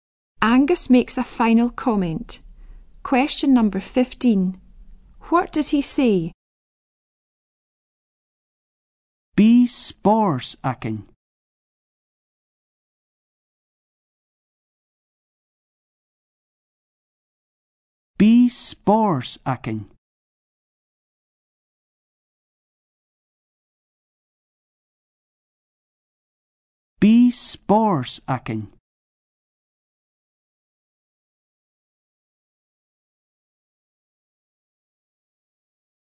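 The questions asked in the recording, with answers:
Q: What does he say?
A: We will have fun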